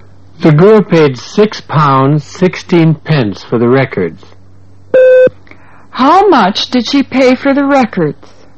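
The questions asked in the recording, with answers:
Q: How much did she pay for the records?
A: £6.16.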